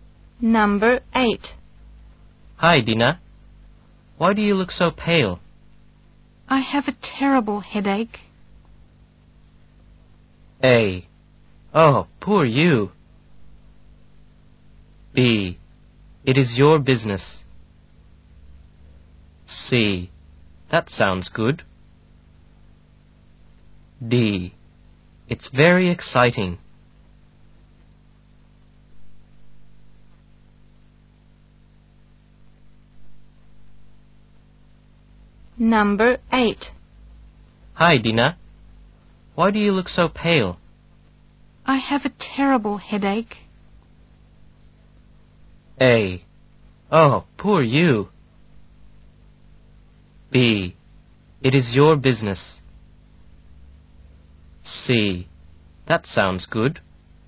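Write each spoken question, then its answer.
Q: I have a terrible headache.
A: A: Oh, poor you.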